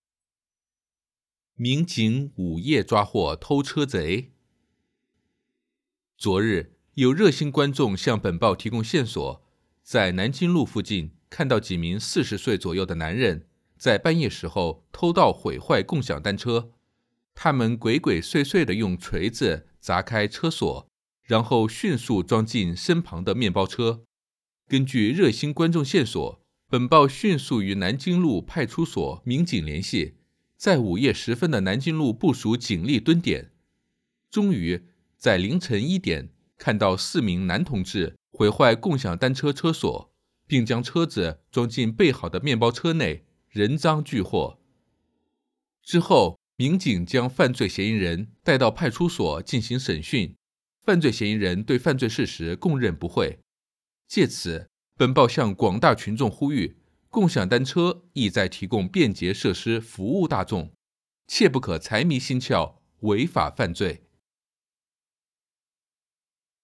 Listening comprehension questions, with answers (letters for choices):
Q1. 你可能会在哪个地方看到这篇文章?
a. 杂志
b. 网络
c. 报纸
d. 书籍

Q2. 关于这篇文章错误的是?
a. 几名男同志半夜偷到共享单车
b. 他们将窃取的共享单车放到准备好的面包车里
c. 盗贼不承认自己的偷盗行为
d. 共享单车不可以被私自破坏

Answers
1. c
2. c

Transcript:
HEADING: 民警午夜抓获偷车贼
昨日,有热心观众向本报提供线索,在南京路附近看到几名四十岁左右的男人,在半夜时候偷盗毁坏共享单车。他们鬼鬼祟祟的用锤子砸开车锁,然后迅速装进身旁的面包车。
他们鬼鬼祟祟的用锤子砸开车锁,然后迅速装进身旁的面包车。 根据热心观众线索,本报迅速与南京路派出所民警联系,在午夜时分的南京路部署警力蹲点。终于,在凌晨一点,看到四名男同志,毁坏共享单车车锁,并将车子装进备好的面包车内,人赃俱获。 之后,民警将犯罪嫌疑人带到派出所进行审讯,犯罪嫌疑人对犯罪事实供认不讳。借此,本报向广大群众呼吁,共享单车意在提供便捷设施服务大众,切不可财迷心窍,违法犯罪。

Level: HSK 5